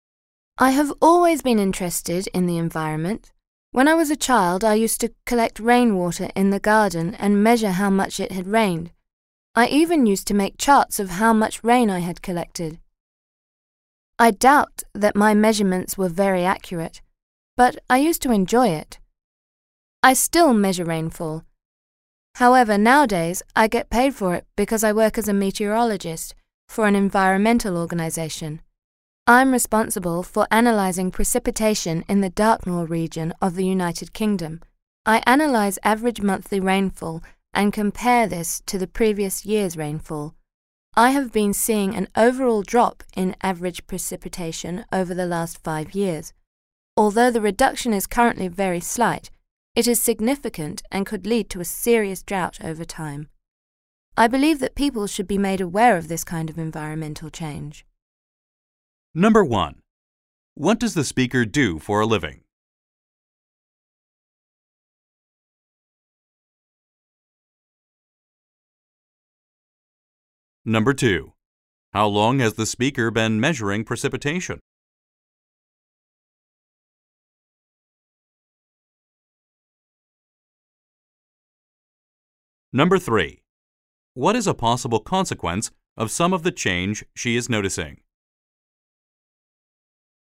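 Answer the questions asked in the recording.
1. She is a meteorologist for an environmental organization.
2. Since she was a child.
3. A serious drought.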